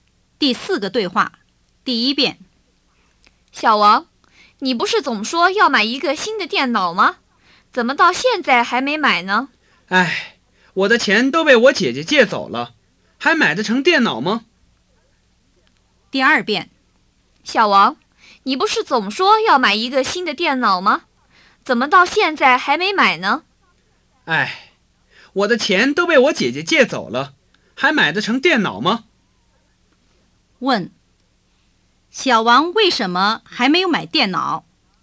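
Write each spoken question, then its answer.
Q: 小王为什么还没有买电脑?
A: 因为他的钱都被他姐姐借走了。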